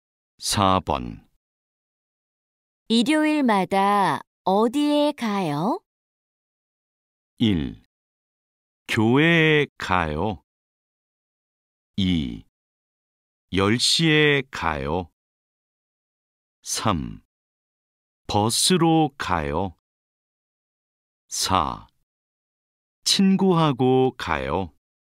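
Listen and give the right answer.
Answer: 1: 교회에 가요.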